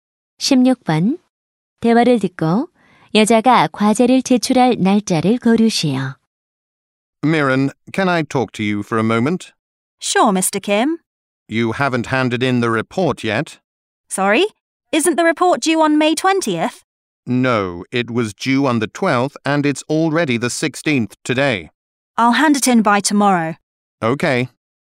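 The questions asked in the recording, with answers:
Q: 대화를 듣고 여자가 과제를 제출할 날짜를 고르시오.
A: 17일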